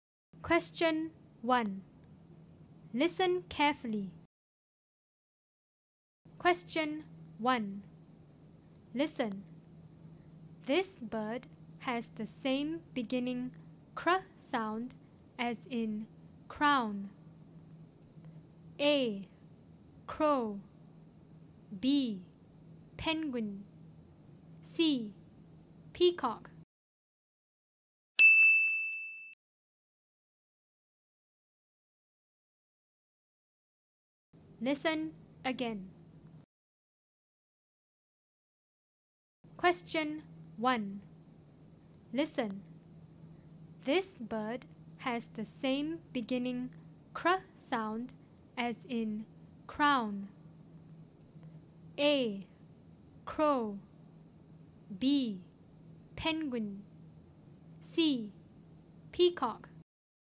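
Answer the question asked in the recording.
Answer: A: Crow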